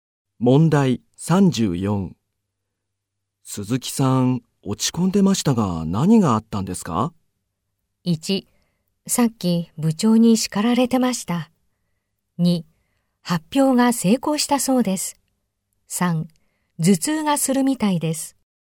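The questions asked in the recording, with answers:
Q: 鈴木さん、落ち込んでましたが、何があったんですか?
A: 1: さっき部長に叱られてました。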